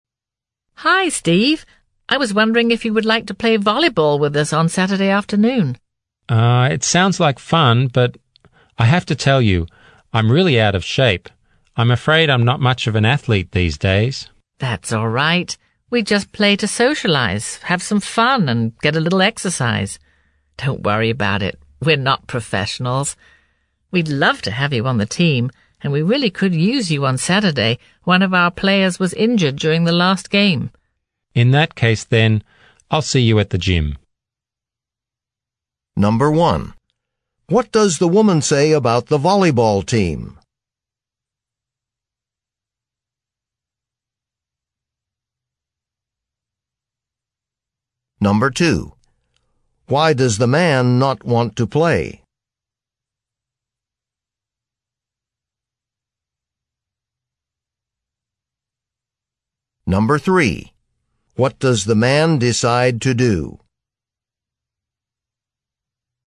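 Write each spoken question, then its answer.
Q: What does the woman say about the volleyball team?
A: They play just to socialize, have fun and get some exercise; they're not professionals.

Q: Why does the man not want to play?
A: He is out of shape and not much of an athlete.

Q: What does the man decide to do?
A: He agrees to play and will meet them at the gym on Saturday.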